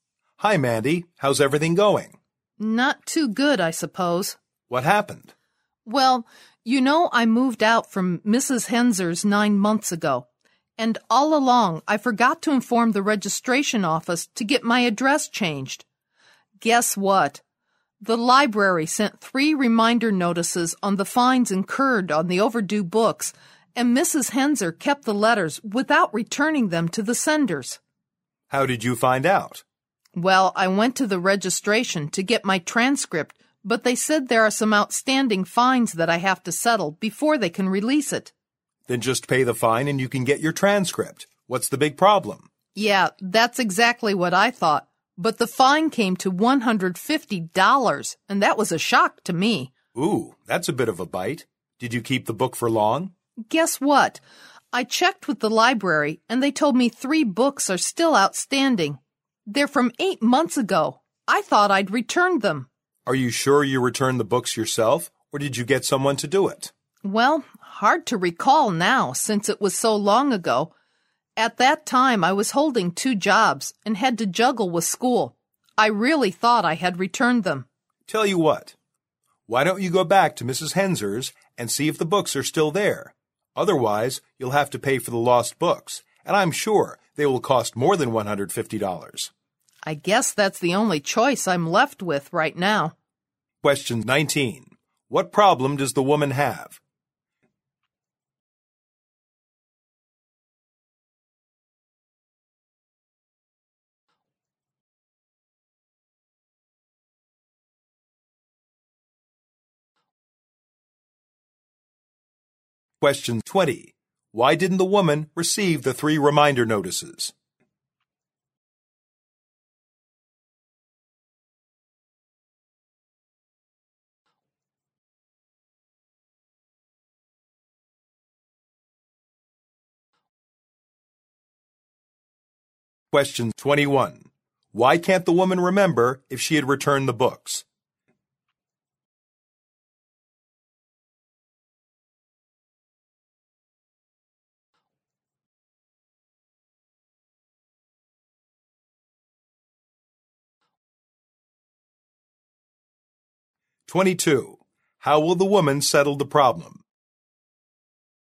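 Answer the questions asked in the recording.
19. She has $150 in overdue library fines, so she can't get her transcript.
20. She moved and didn't change her address, and Mrs. Henser kept the letters.
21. It was long ago and she was busy with two jobs and school.
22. She will go back to Mrs. Henser's to look for the books.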